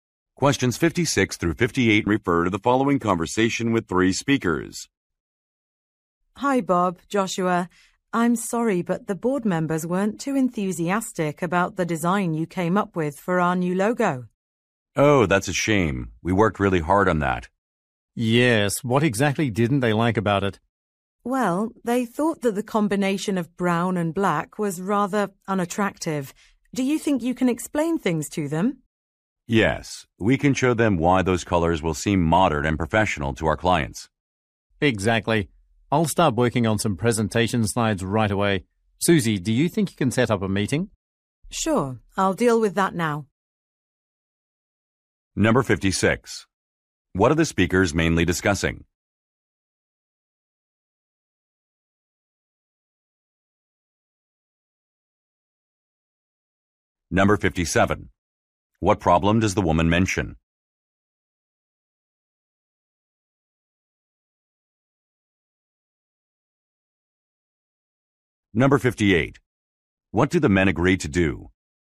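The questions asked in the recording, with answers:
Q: What are the speakers mainly discussing?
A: A new logo design

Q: What problem does the woman mention?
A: The board members did not like the colors

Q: What do the men agree to do?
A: Explain the design to the board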